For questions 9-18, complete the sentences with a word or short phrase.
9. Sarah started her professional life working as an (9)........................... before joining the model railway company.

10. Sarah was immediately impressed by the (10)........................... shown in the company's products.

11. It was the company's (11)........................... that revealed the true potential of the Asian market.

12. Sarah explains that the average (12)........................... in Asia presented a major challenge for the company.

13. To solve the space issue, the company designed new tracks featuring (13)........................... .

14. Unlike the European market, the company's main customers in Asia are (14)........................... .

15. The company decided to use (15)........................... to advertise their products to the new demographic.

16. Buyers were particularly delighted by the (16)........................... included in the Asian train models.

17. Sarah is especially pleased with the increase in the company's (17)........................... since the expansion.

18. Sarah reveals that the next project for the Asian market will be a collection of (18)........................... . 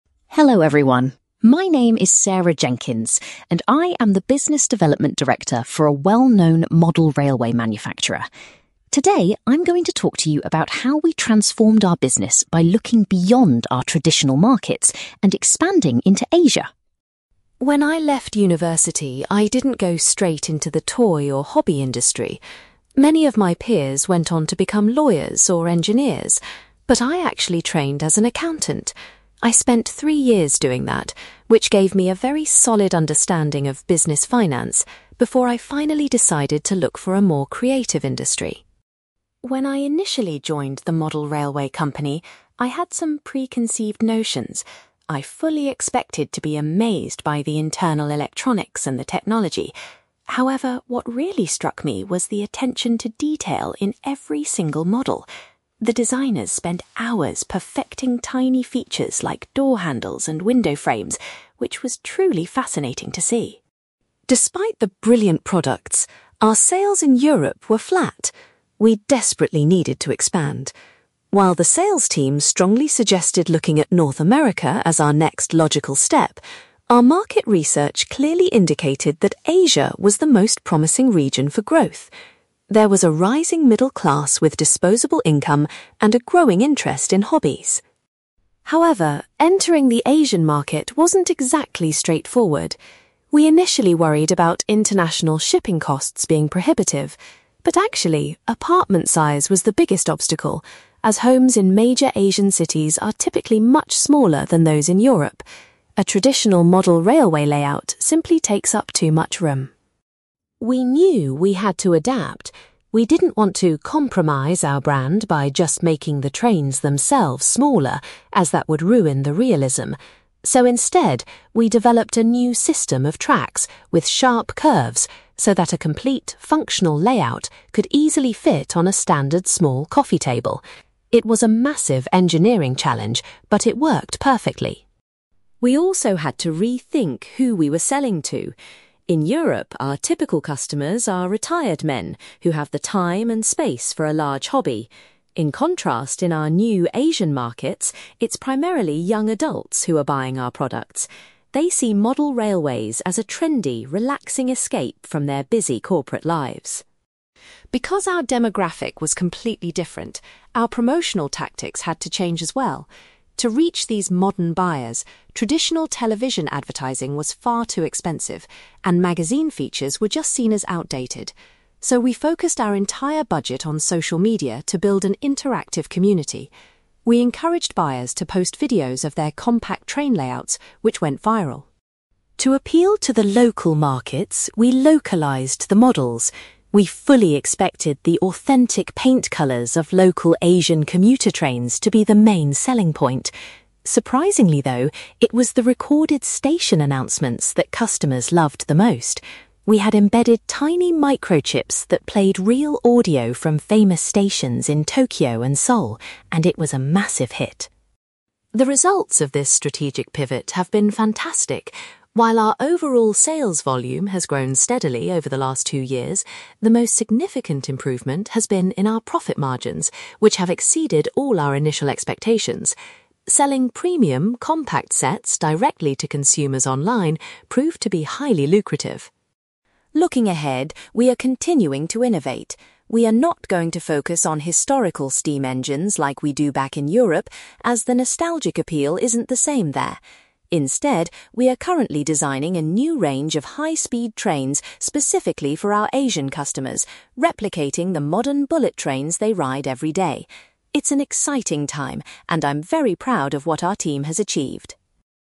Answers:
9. accountant
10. attention to detail
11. market research
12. apartment size
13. sharp curves
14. young adults
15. social media
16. station announcements
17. profit margins
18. high-speed trains

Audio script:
Sarah Jenkins: Hello, everyone. My name is Sarah Jenkins, and I am the Business Development Director for a well-known model railway manufacturer. Today, I'm going to talk to you about how we transformed our business by looking beyond our traditional markets and expanding into Asia.
When I left university, I didn't go straight into the toy or hobby industry. Many of my peers went on to become lawyers or engineers, but I actually trained as an accountant. I spent three years doing that, which gave me a very solid understanding of business finance, before I finally decided to look for a more creative industry.
When I initially joined the model railway company, I had some preconceived notions. I fully expected to be amazed by the internal electronics and the technology. However, what really struck me was the attention to detail in every single model. The designers spent hours perfecting tiny features like door handles and window frames, which was truly fascinating to see.
Despite the brilliant products, our sales in Europe were flat. We desperately needed to expand. While the sales team strongly suggested looking at North America as our next logical step, our market research clearly indicated that Asia was the most promising region for growth. There was a rising middle class with disposable income and a growing interest in hobbies.
However, entering the Asian market wasn't exactly straightforward. We initially worried about international shipping costs being prohibitive, but actually, apartment size was the biggest obstacle, as homes in major Asian cities are typically much smaller than those in Europe. A traditional model railway layout simply takes up too much room.
We knew we had to adapt. We didn't want to compromise our brand by just making the trains themselves smaller, as that would ruin the realism. So instead, we developed a new system of tracks with sharp curves so that a complete, functional layout could easily fit on a standard small coffee table. It was a massive engineering challenge, but it worked perfectly.
We also had to rethink who we were selling to. In Europe, our typical customers are retired men who have the time and space for a large hobby. In contrast, in our new Asian markets, it's primarily young adults who are buying our products. They see model railways as a trendy, relaxing escape from their busy corporate lives.
Because our demographic was completely different, our promotional tactics had to change as well. To reach these modern buyers, traditional television advertising was far too expensive, and magazine features were just seen as outdated. So, we focused our entire budget on social media to build an interactive community. We encouraged buyers to post videos of their compact train layouts, which went viral.
To appeal to the local markets, we localized the models. We fully expected the authentic paint colours of local Asian commuter trains to be the main selling point. Surprisingly, though, it was the recorded station announcements that customers loved the most. We had embedded tiny microchips that played real audio from famous stations in Tokyo and Seoul, and it was a massive hit.
The results of this strategic pivot have been fantastic. While our overall sales volume has grown steadily over the last two years, the most significant improvement has been in our profit margins, which have exceeded all our initial expectations. Selling premium, compact sets directly to consumers online proved to be highly lucrative.
Looking ahead, we are continuing to innovate. We are not going to focus on historical steam engines like we do back in Europe, as the nostalgic appeal isn't the same there. Instead, we are currently designing a new range of high-speed trains specifically for our Asian customers, replicating the modern bullet trains they ride every day. It's an exciting time, and I'm very proud of what our team has achieved.

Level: B2